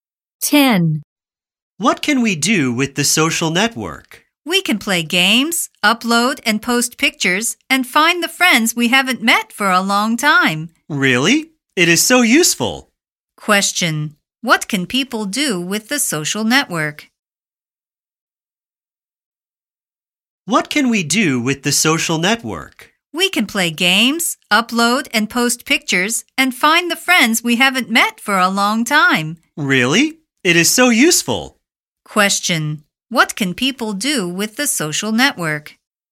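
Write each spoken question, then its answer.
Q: What can people do with the social network?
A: Play games, upload and post pictures, and find old friends.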